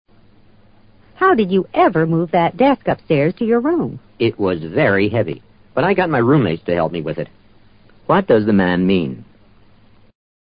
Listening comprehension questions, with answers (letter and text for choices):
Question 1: What does the man mean?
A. He and his roommates moved the desk.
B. The desk wasn't as heavy as it looks.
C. His roommates found him another desk.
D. They had to get a moving company to help.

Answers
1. A. He and his roommates moved the desk.

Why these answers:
答案A与I got my roommates to help me with it 表达的意思相同。moving company: 搬家公司。